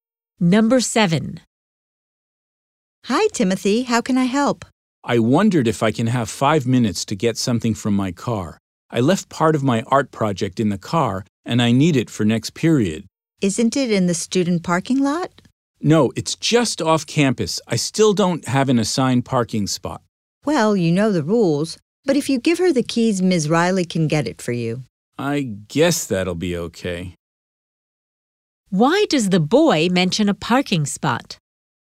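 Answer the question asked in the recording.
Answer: To explain that his car is parked off campus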